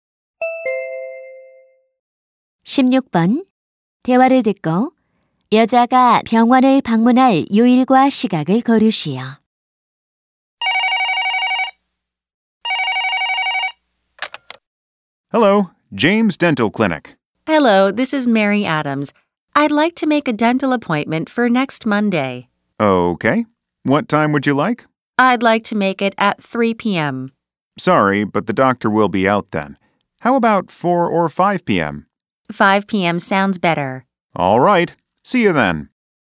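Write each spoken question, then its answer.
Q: 대화를 듣고 여자가 병원을 방문할 요일과 시각을 거르시오.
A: 월요일 오후 5시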